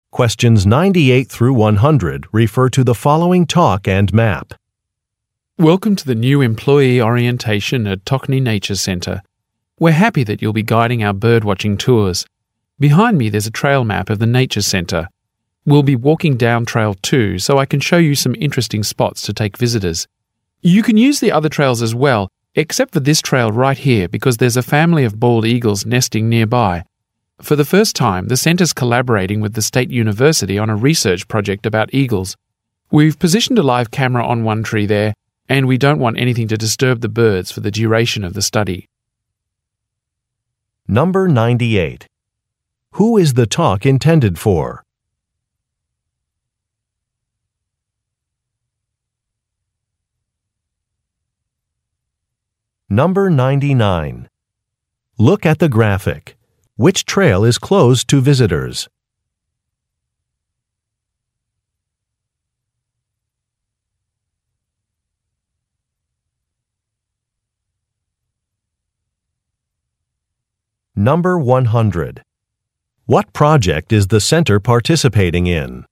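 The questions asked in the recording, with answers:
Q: Who is the talk intended for?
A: New birdwatching tour guides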